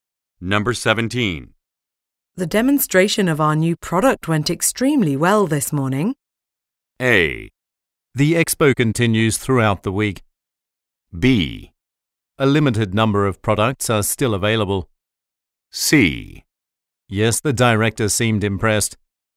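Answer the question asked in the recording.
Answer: C: Yes, the director seemed impressed.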